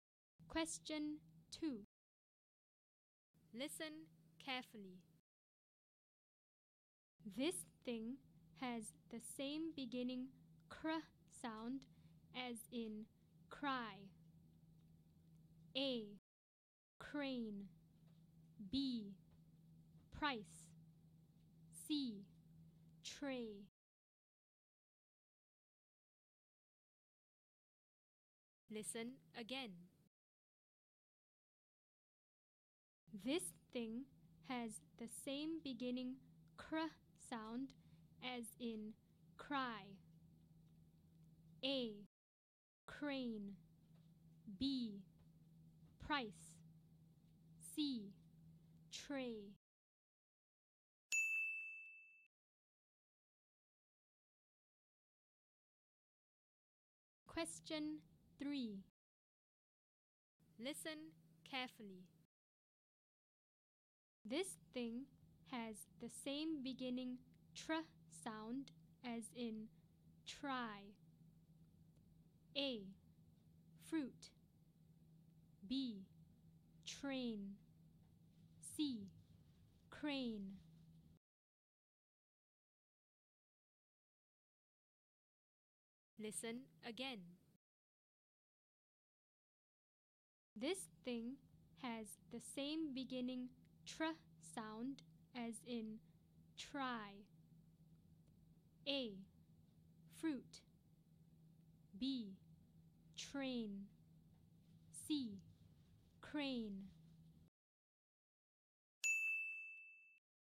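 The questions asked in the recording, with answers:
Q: This thing has the same beginning cr sound as in cry.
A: A: Crane

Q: This thing has the same beginning tr sound as in try.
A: B: Train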